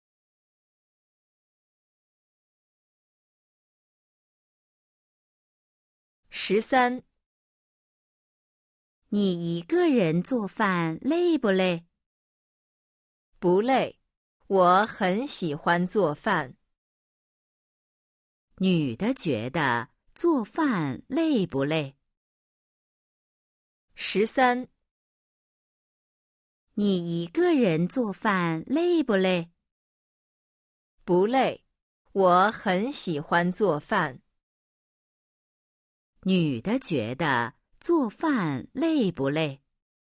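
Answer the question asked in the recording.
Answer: 不累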